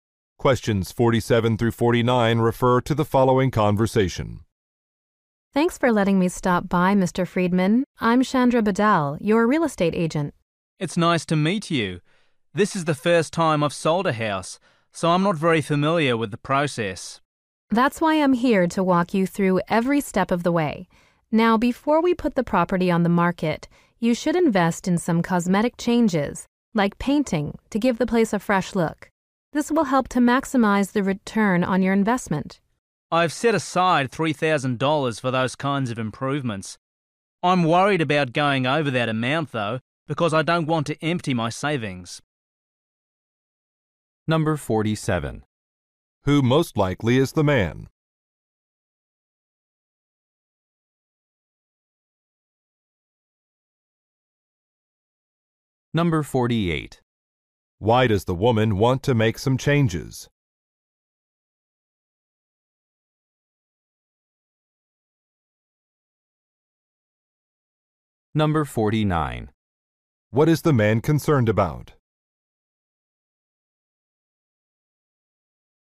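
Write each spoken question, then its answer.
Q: Who most likely is the man?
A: A homeowner selling his house

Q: Why does the woman want to make some changes?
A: To maximize the return on his investment

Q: What is the man concerned about?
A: Spending more than his $3,000 budget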